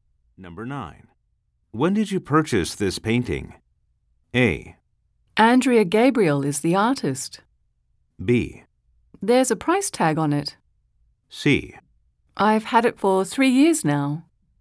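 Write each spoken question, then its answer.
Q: When did you purchase this painting?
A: C: I've had it for 3 years now.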